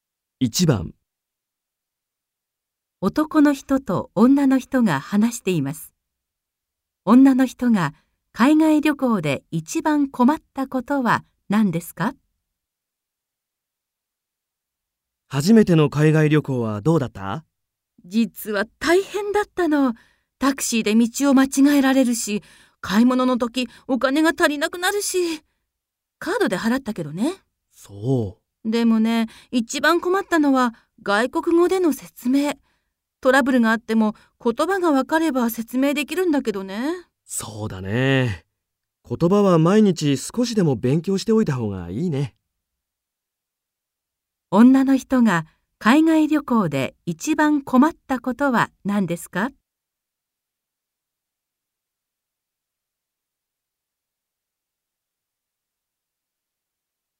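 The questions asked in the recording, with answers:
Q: 女の人が海外旅行で一番困ったことは何ですか?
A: 外国語で説明すること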